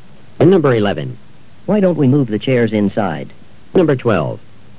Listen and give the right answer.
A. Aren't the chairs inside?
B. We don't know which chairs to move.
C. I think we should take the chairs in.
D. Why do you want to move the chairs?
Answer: C. I think we should take the chairs in.

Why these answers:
Why don't we move the chairs inside?